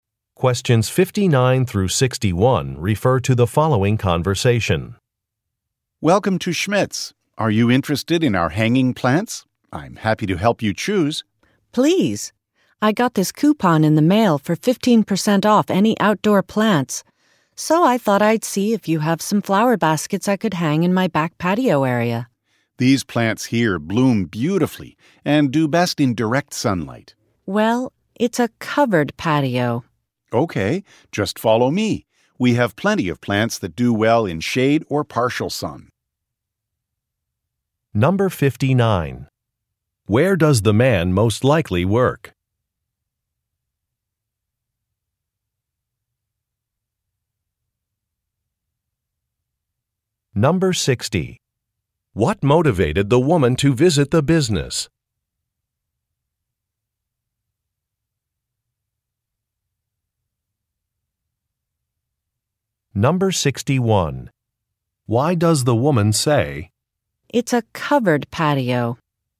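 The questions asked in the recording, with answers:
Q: Where does the man most likely work?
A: At a plant store (garden center)

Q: What motivated the woman to visit the business?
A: She received a coupon for 15% off outdoor plants

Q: Why does the woman say, "It's a covered patio"?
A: To indicate the plants won't get direct sunlight, so she needs plants that do well in shade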